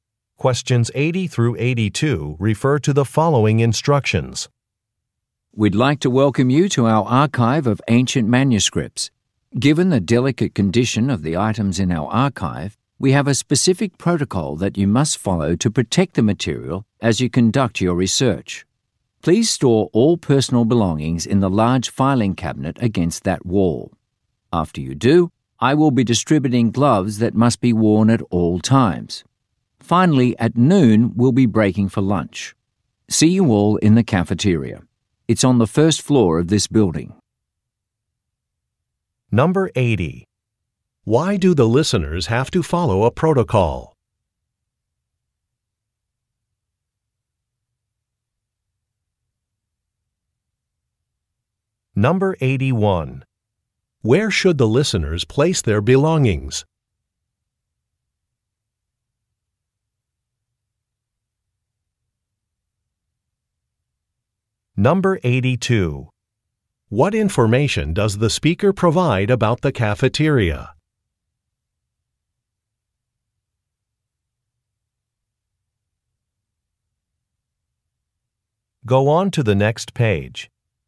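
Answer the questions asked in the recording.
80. The items are delicate and must be protected
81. In the large filing cabinet against the wall
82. It is on the first floor of the building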